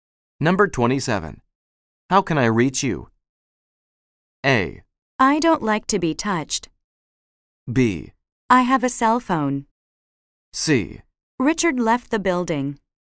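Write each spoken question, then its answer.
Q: How can I reach you?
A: B: I have a cell phone.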